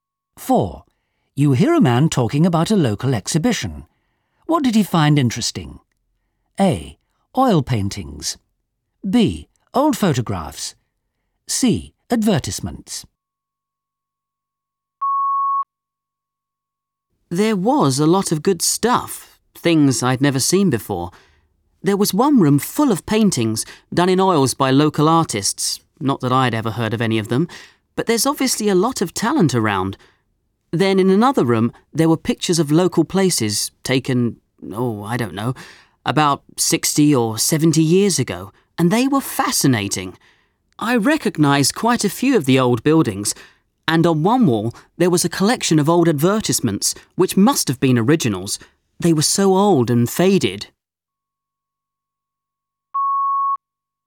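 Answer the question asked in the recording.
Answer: B: Old photographs.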